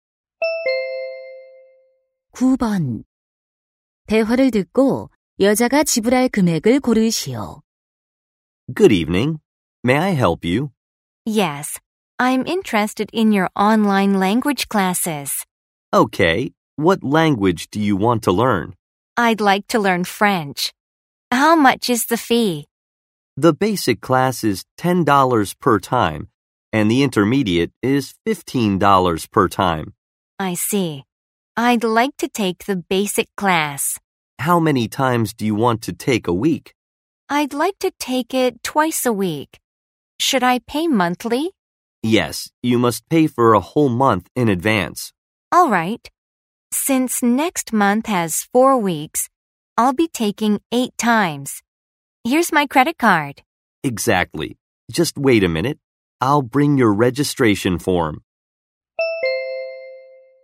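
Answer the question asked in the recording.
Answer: $80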